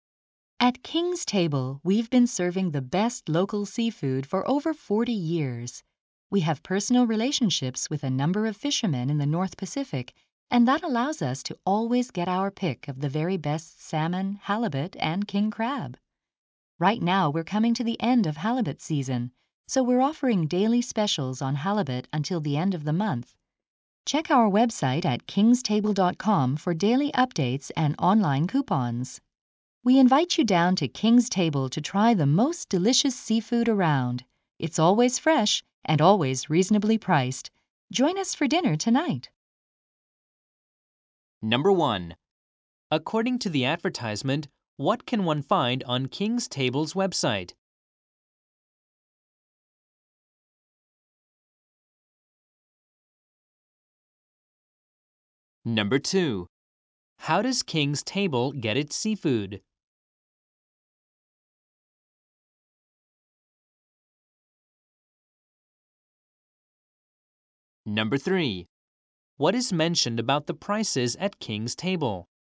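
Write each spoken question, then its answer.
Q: According to the advertisement, what can one find on King's Table's website?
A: Daily updates and online coupons

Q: How does King's Table get its seafood?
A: Through personal relationships with fishermen in the North Pacific

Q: What is mentioned about the prices at King's Table?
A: They are reasonable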